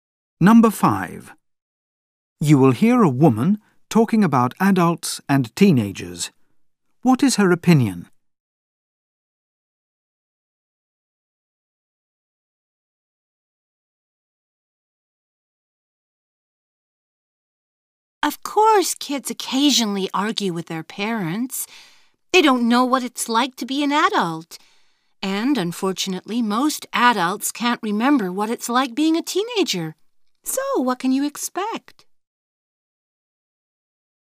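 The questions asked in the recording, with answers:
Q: What is her opinion?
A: Arguments are natural because adults and teens don't understand each other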